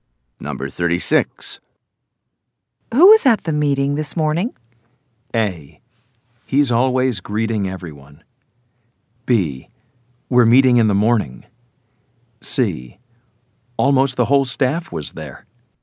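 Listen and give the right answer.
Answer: C: Almost the whole staff was there.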